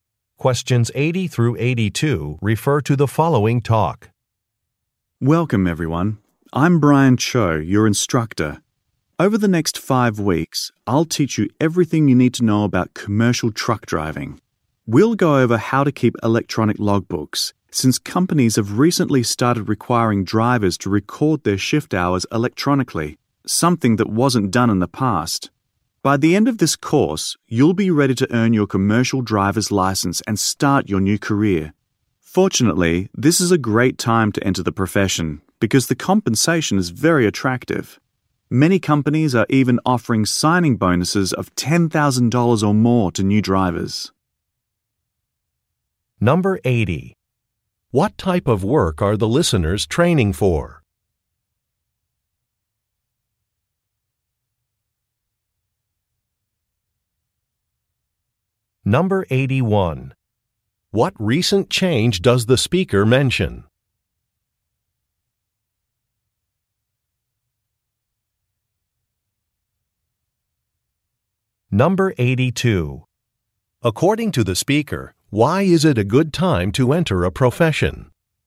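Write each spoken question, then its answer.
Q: What type of work are the listeners training for?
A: Commercial truck driving

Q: What recent change does the speaker mention?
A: Companies require electronic logbooks for shift hours

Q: According to the speaker, why is it a good time to enter a profession?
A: Compensation is very attractive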